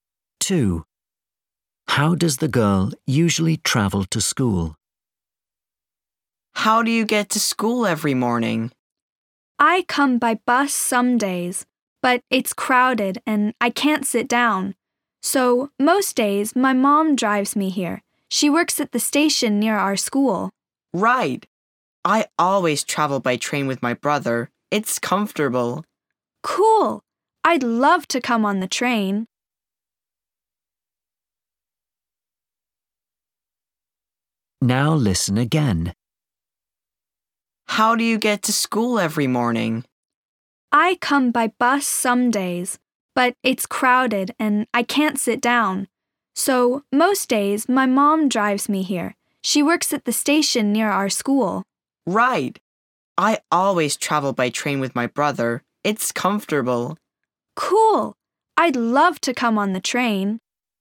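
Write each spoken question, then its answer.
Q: How does the girl usually travel to school?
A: By car (her mum drives her)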